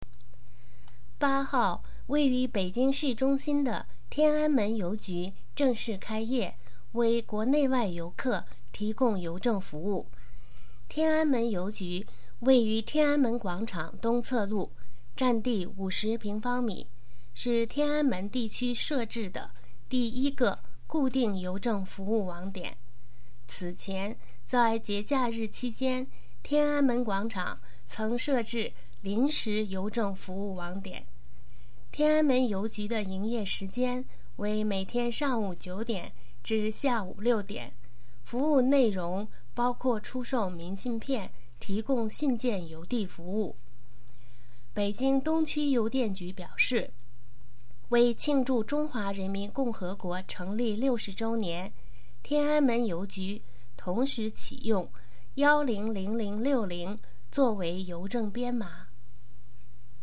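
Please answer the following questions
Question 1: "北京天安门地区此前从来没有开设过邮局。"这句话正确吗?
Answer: 不正确,此前节假日曾设置临时邮政服务网点

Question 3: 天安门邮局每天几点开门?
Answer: 上午9点

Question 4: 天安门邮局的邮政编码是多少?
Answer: 100060

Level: M.Phil Year 2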